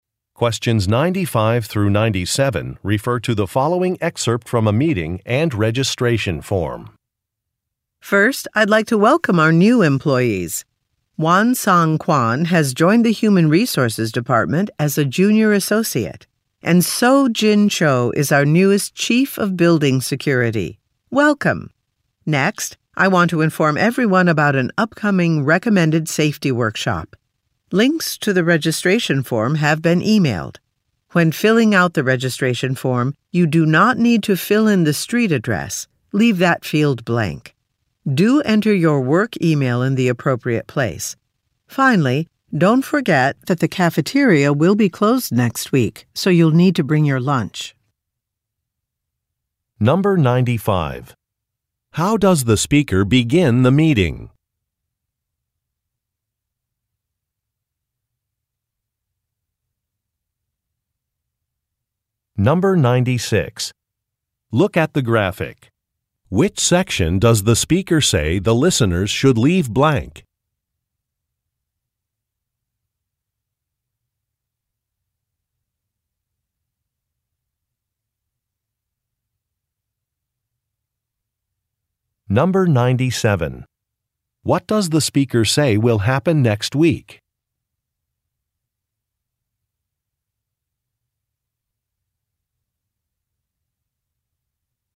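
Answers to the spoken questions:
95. By welcoming new employees
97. The cafeteria will be closed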